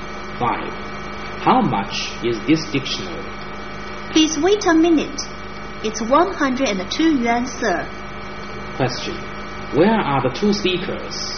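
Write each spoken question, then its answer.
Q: Where are the two speakers?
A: In a bookshop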